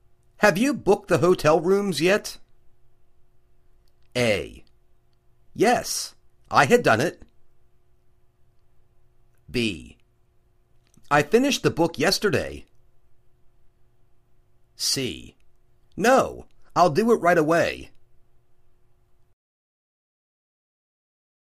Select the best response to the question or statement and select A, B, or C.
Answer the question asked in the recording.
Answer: No, I'll do it right away.